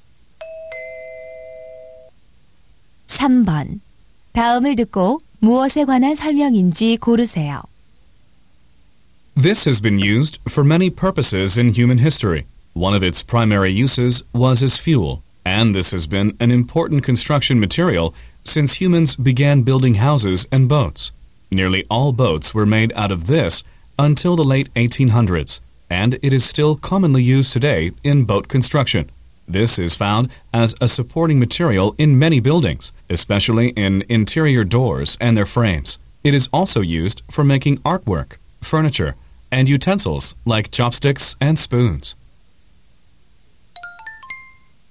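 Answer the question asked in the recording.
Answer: 나무(목재)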